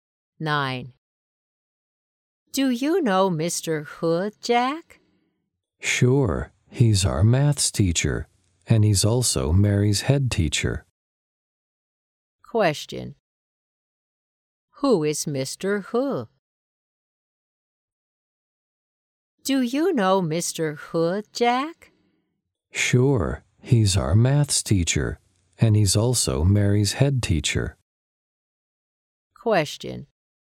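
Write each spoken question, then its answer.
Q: Who is Mr. Hu?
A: Their maths teacher and Mary's head teacher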